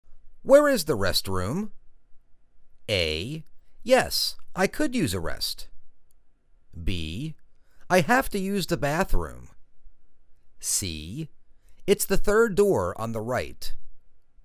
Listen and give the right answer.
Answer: It's the third door on the right.